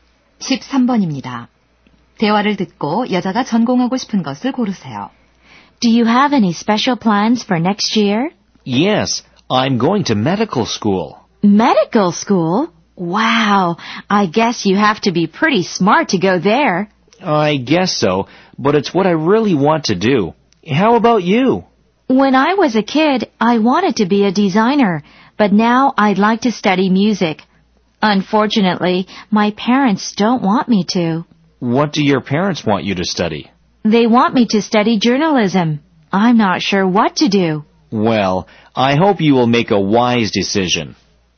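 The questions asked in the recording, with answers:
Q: 대화를 듣고 여자가 전공하고 싶은 것을 고르세요.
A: 음악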